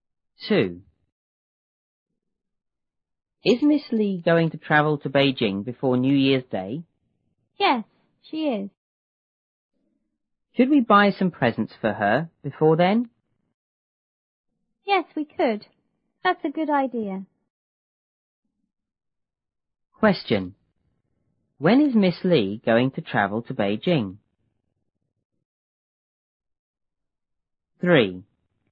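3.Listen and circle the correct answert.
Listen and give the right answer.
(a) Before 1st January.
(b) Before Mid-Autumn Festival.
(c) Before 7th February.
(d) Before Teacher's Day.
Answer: (a) Before 1st January.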